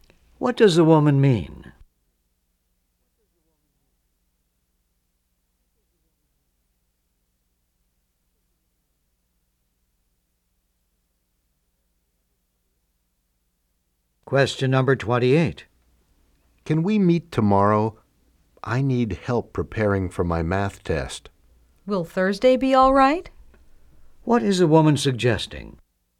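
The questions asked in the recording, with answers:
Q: What is the woman suggesting?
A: Meeting on Thursday.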